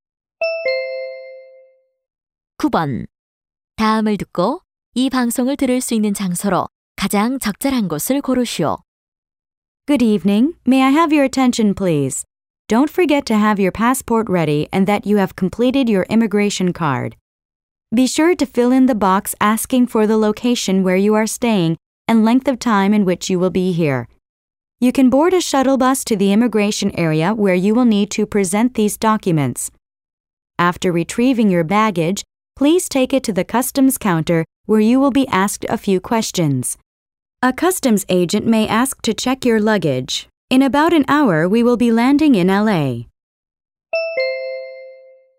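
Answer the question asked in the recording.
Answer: 비행기 안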